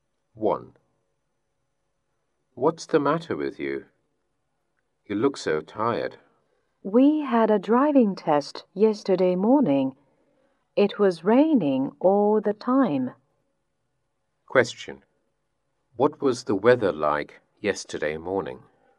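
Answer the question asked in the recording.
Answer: It was rainy.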